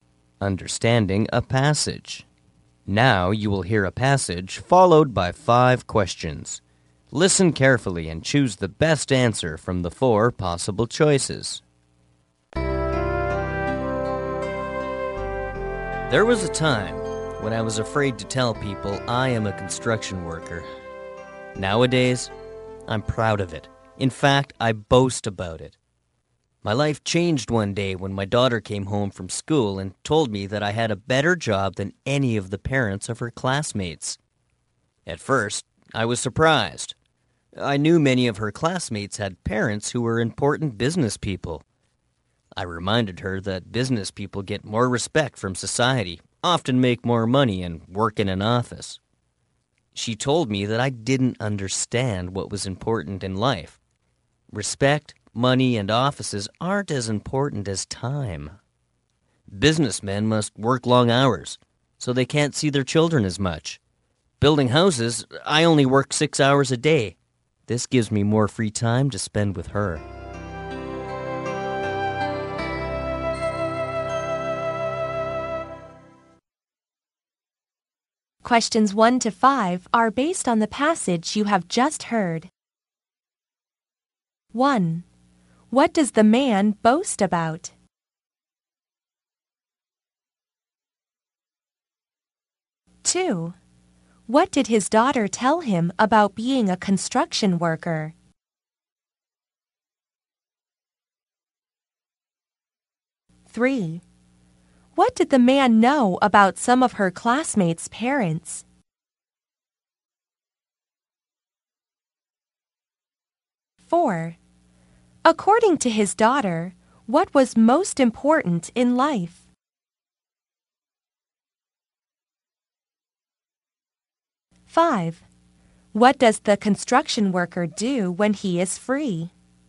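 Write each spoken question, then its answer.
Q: What does the man boast about?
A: Being a construction worker.

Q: What did his daughter tell him about being a construction worker?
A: He had a better job than her classmates' parents.

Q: What did the man know about some of her classmates' parents?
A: They were important business people.

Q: According to his daughter, what was most important in life?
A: Time.

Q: What does the construction worker do when he is free?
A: Spends time with his daughter.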